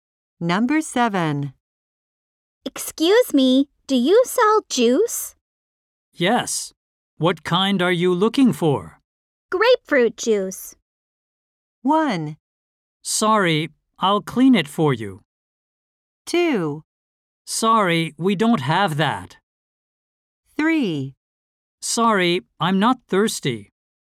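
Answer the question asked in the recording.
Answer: 2: Sorry, we don't have that.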